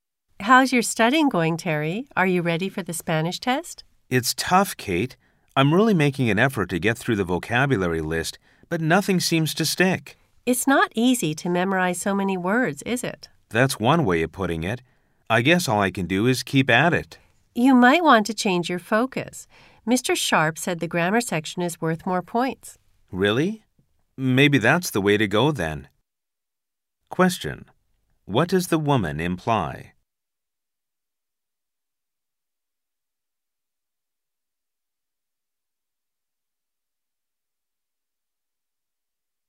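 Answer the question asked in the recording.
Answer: Terry should focus on studying grammar rather than vocabulary, since the grammar section is worth more points.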